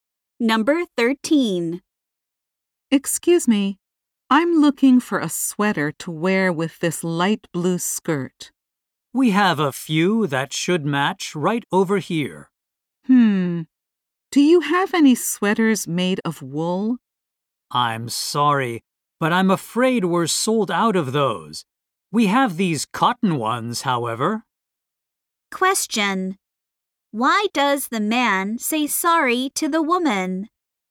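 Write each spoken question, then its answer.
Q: Why does the man say sorry to the woman?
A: The wool sweaters are sold out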